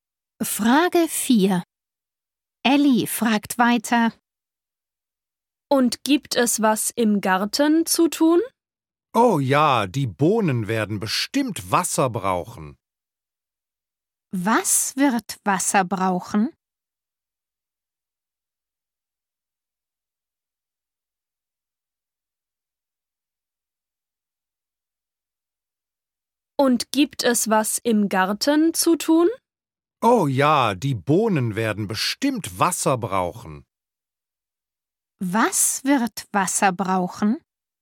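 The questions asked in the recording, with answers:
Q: Was wird Wasser brauchen?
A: die Bohnen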